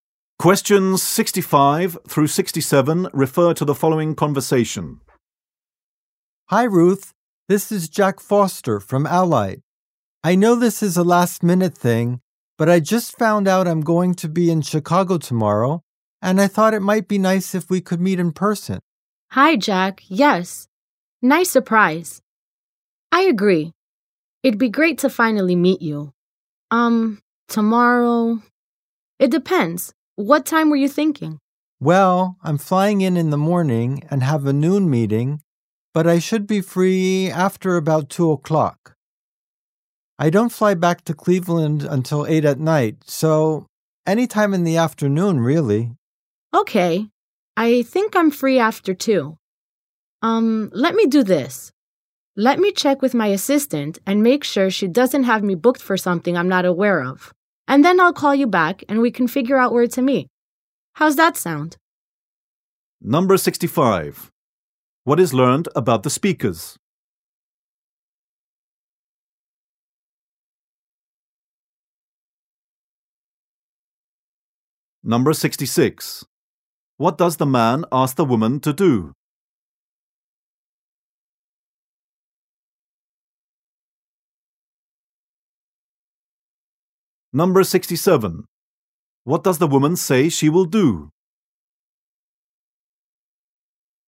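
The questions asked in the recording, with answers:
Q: What is learned about the speakers?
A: They have never met in person

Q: What does the man ask the woman to do?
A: Meet him in person tomorrow

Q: What does the woman say she will do?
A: Check with her assistant and call him back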